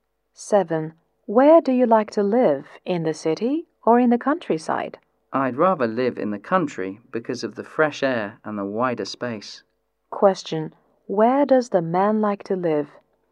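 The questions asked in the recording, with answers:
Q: Where does the man like to live?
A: In the countryside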